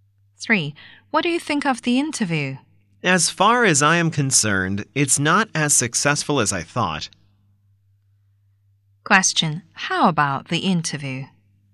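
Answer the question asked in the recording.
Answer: It was not as successful as he thought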